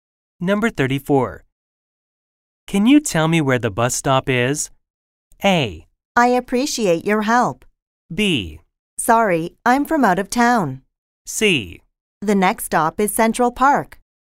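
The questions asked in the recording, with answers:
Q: Can you tell me where the bus stop is?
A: B: Sorry, I'm from out of town.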